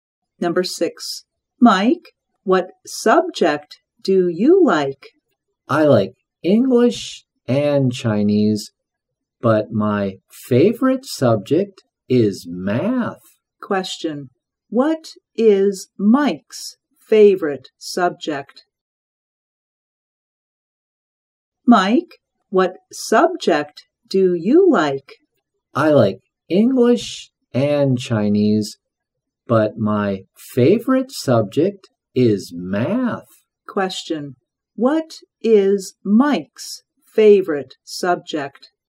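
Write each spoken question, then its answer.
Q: What is Mike's favorite subject?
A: Math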